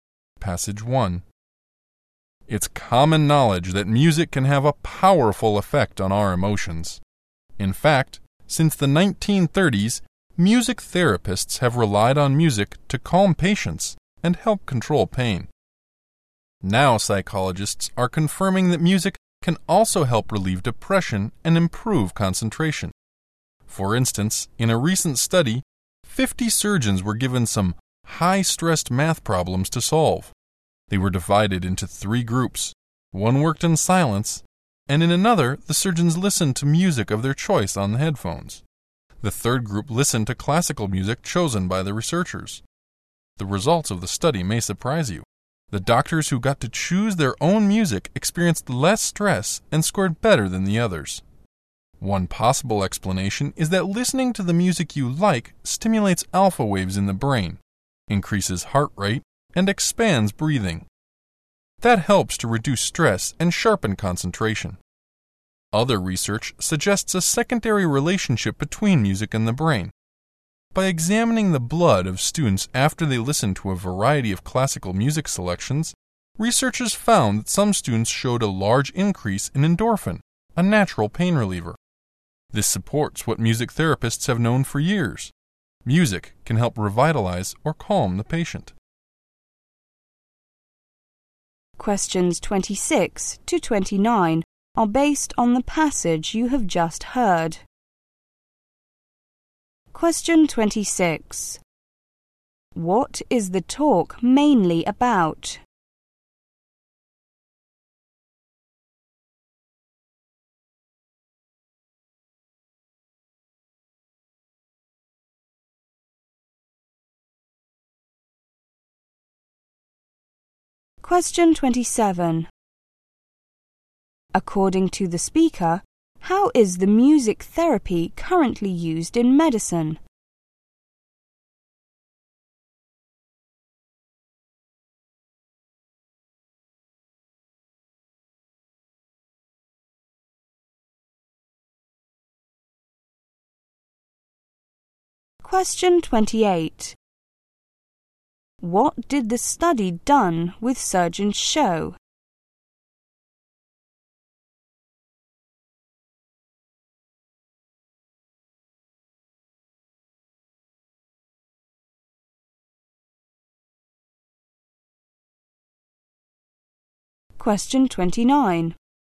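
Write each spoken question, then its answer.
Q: What is the talk mainly about?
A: The effects of music on the mind and body

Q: According to the speaker, how is the music therapy currently used in medicine?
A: To calm patients and help control pain

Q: What did the study done with surgeons show?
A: Surgeons who chose their own music had less stress and scored better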